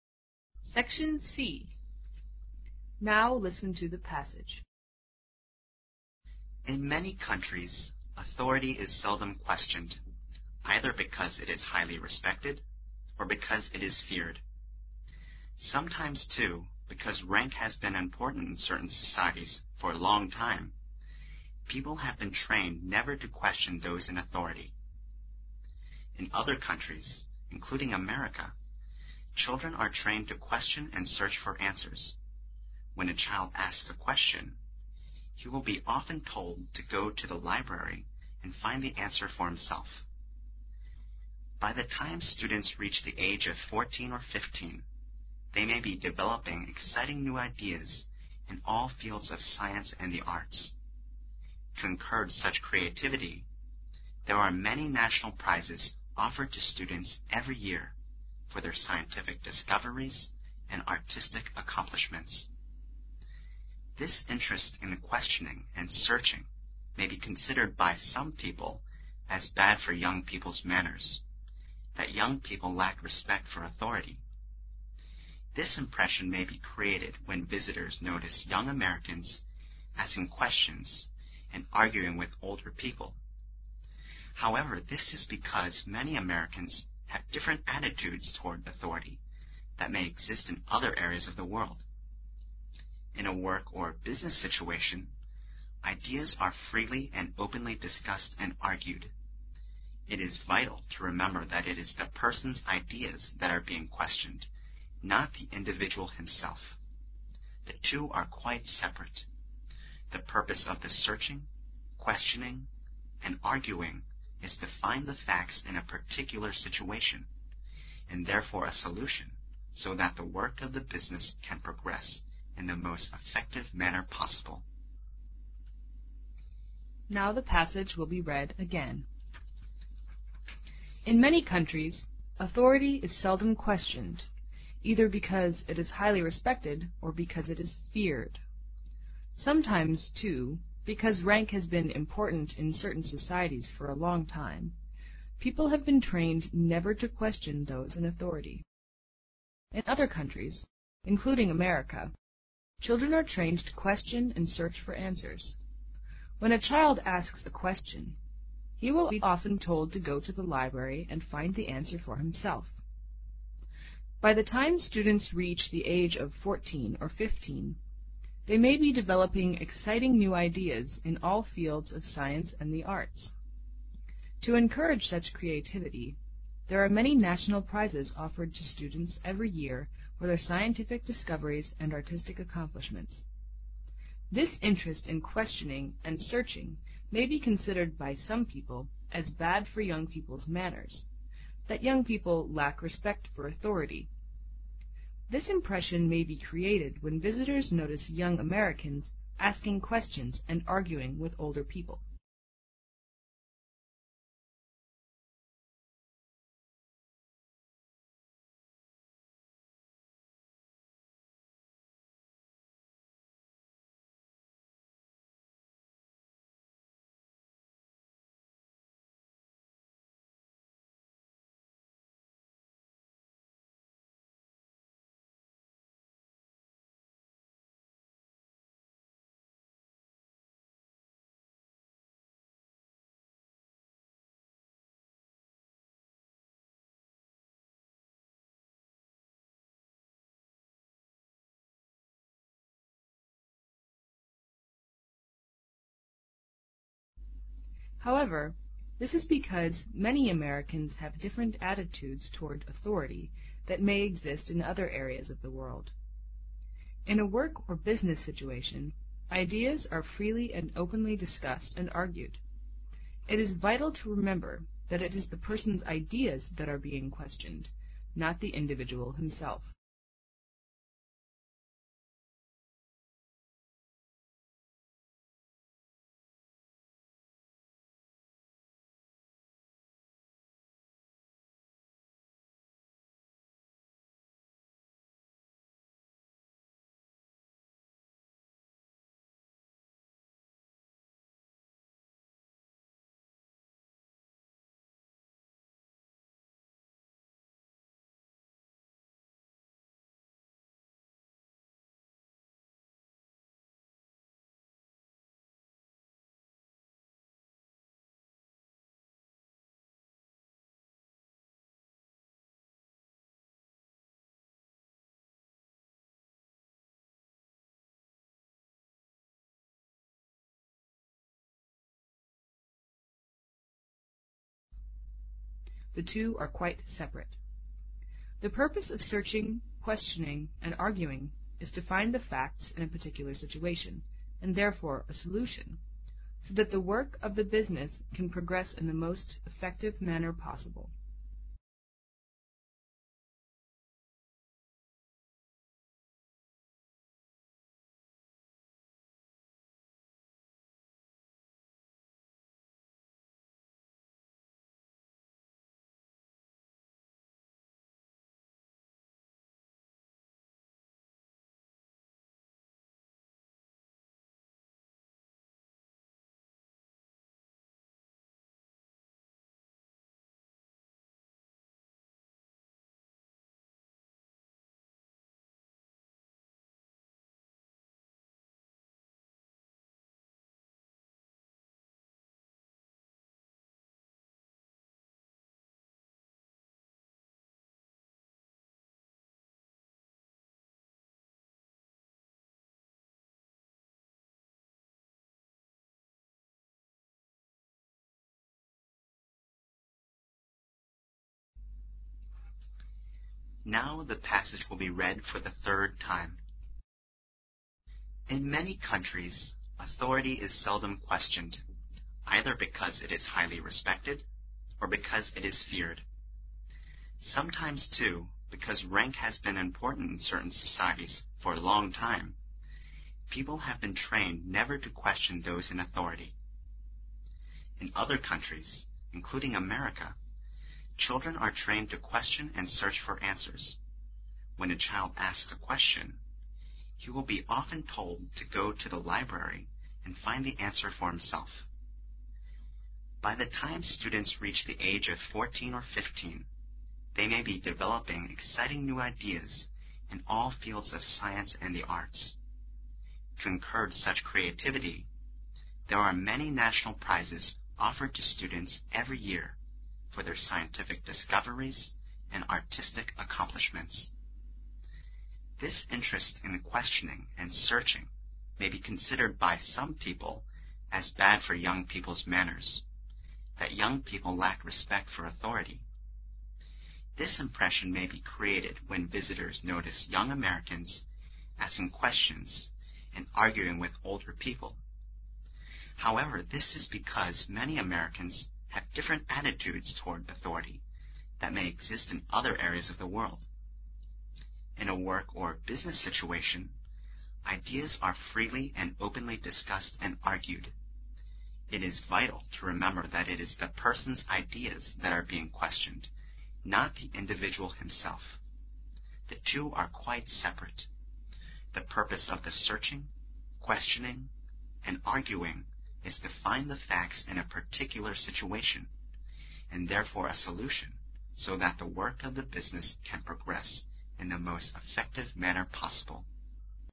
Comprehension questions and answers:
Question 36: In many countries, authority is seldom questioned, either because it is highly respected, or because it is (36) _______.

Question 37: Sometimes, too, because (37) _______ has been important in certain societies for a long time, people have been trained never to question those in authority.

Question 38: In other countries, (38) _______America, children are trained to question and search for answers.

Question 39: By the time students reach the age of 14 or 15, they may be (39) _______ exciting new ideas in all fields of science and the arts.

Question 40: To encourage such creativity, there are many national (40) _______ offered to students every year for their scientific discoveries and artistic (41) _______.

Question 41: To encourage such creativity, there are many national (40) _______ offered to students every year for their scientific discoveries and artistic (41) _______.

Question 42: This interest in questioning and searching may be (42) _______ by some people as bad for young people's (43) _______, that young people lack respect for authority.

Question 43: This interest in questioning and searching may be (42) _______ by some people as bad for young people's (43) _______, that young people lack respect for authority.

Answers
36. feared
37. rank
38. including
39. developing
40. prizes
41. accomplishments
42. considered
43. manners

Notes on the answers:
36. 根据either...or...可以判断所填词和respected词性一致(即也是v+ed形式),语义相对。一方面是尊敬之情,那么另一种可能就是畏惧之情了。
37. 从authority可以判断此处指的是社会中的等级。
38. 根据对句子结构的分析可以判断所填词和America一起构成句子的状语,因此应该填入分词形式。
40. 目的是为了encourage such creativity,那么提供的应该是奖励了。
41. 通常来说奖励的是所取得的成就。并且所填词和discoveries形成并列关系。
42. 所填词与本句中的as构成固定搭配(consider...as...)。
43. 根据空格后的that young people lack respect for authority可以判断此处是说对年轻人的礼貌有害。

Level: 英语四级